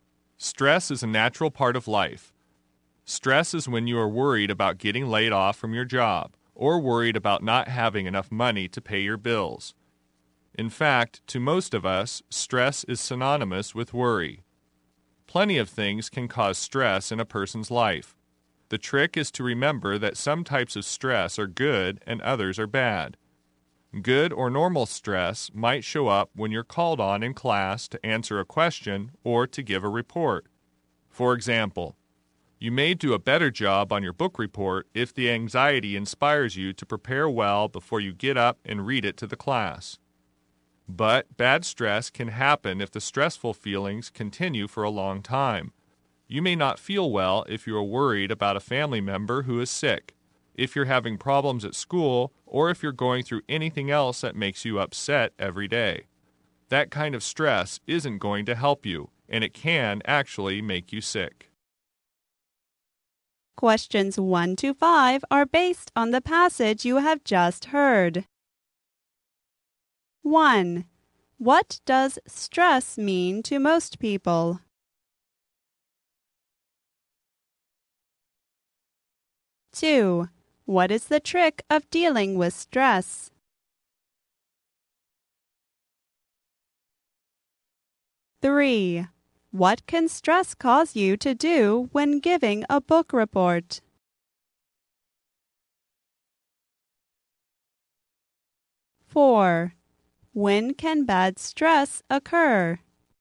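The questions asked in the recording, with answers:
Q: What does stress mean to most people?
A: Worry.

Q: What is the trick of dealing with stress?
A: Remembering that some stress is good and some is bad.

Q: What can stress cause you to do when giving a book report?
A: Prepare well and do a better job.

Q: When can bad stress occur?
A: When stressful feelings continue for a long time.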